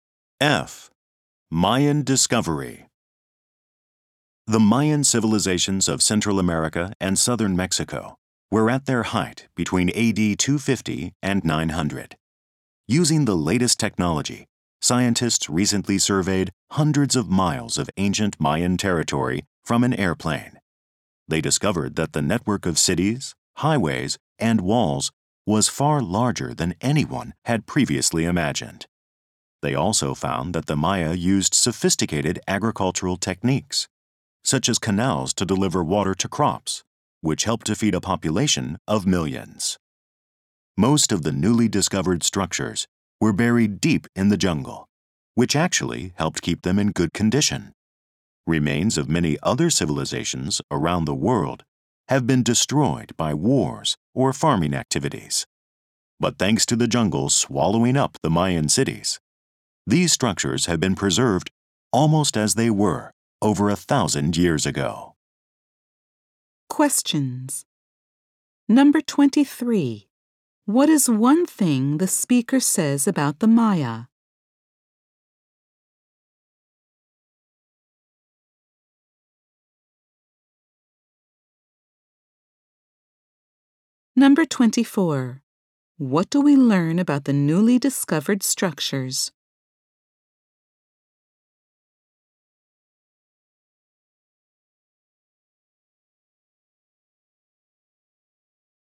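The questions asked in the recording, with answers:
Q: What is one thing the speaker says about the Maya?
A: They used advanced farming methods, such as canals, to feed millions of people.

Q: What do we learn about the newly discovered structures?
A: The jungle kept them in good condition.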